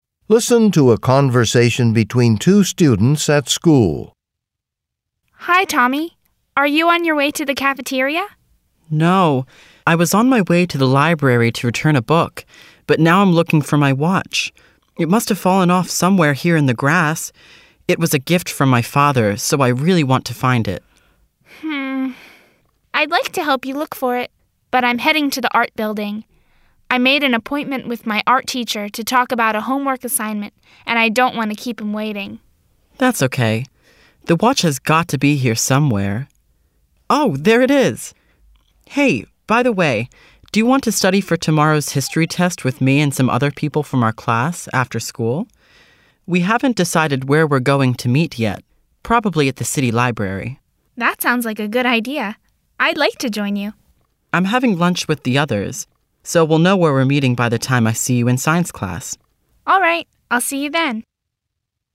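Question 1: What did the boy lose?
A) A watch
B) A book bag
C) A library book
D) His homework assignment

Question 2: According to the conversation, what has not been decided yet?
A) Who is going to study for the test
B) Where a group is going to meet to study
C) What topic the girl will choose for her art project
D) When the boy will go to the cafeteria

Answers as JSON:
{"1": "A", "2": "B"}

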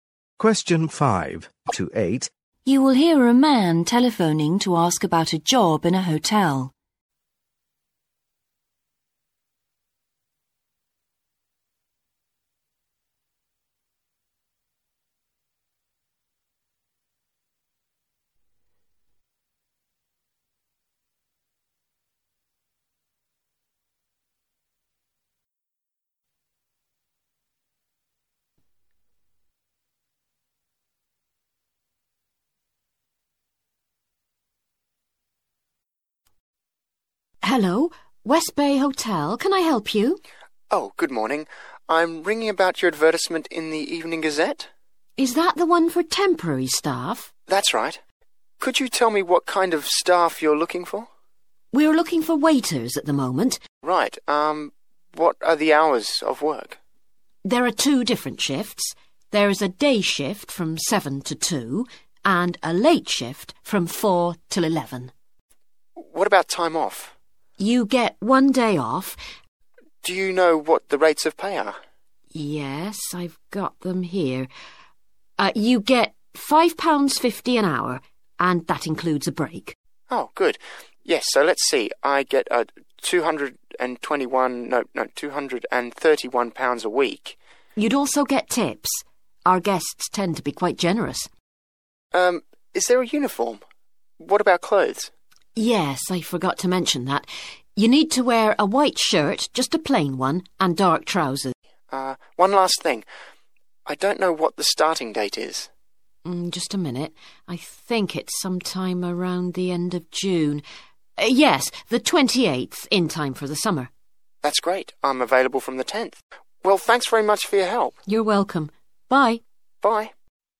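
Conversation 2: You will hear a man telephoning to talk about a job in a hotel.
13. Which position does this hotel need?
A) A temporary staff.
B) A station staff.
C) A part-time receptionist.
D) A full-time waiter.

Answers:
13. A

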